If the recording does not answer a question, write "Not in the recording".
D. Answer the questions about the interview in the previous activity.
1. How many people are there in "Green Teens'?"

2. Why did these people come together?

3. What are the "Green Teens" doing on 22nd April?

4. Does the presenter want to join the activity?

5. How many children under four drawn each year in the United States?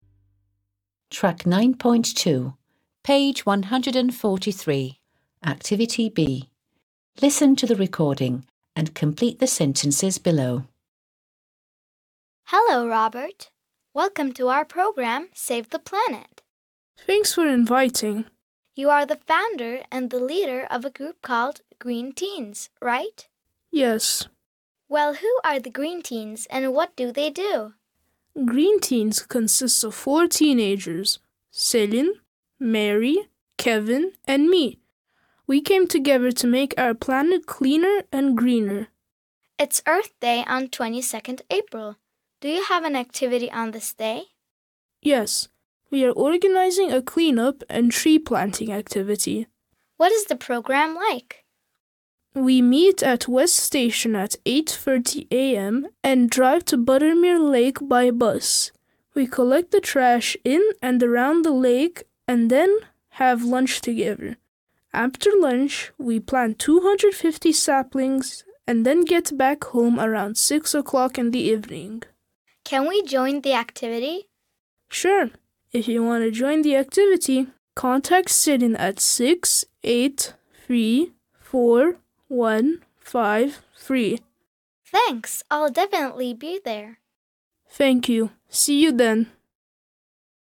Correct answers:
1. There are four people.
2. They came together to make our planet cleaner and greener.
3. They are organizing a clean up and tree planting activity.
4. Yes, she does.
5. Not in the recording

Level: 6. Sınıf